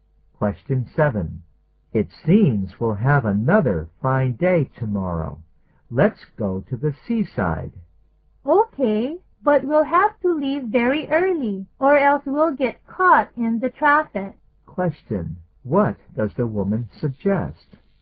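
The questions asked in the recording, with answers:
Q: What does the woman suggest?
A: Leaving very early to avoid the traffic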